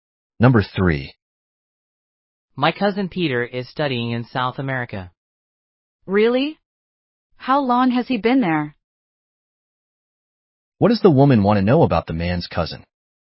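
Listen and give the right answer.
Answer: How long he has been in South America.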